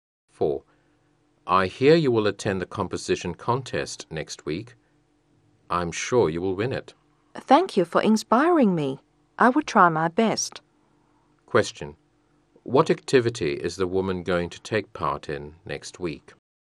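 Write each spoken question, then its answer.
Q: What activity is the woman going to take part in next week?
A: A composition contest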